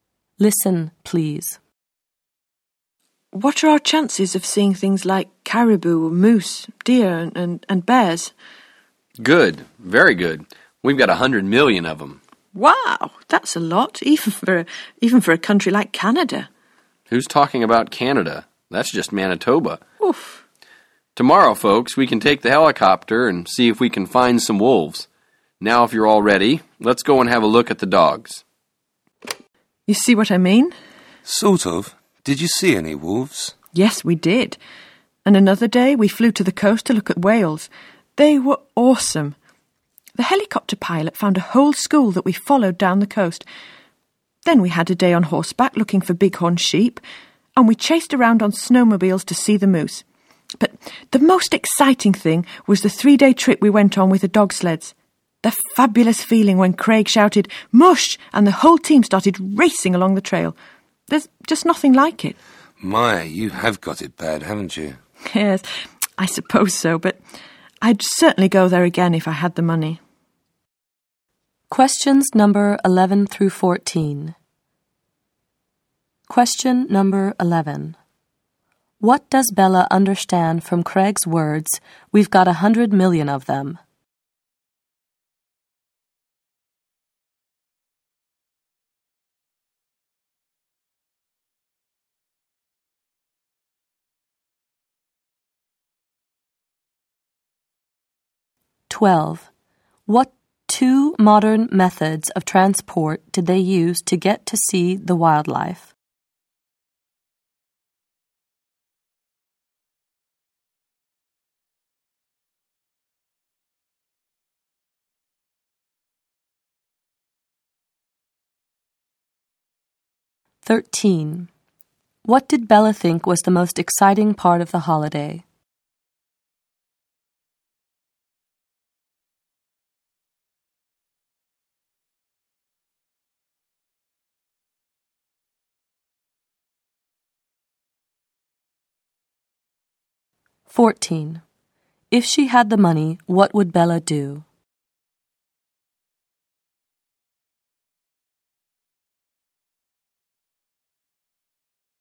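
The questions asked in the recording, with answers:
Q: What two modern methods of transport did they use to get to see the wildlife?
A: Helicopter and snowmobiles

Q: What did Bella think was the most exciting part of the holiday?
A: The 3-day trip with the dog sleds

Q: If she had the money, what would Bella do?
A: Go there again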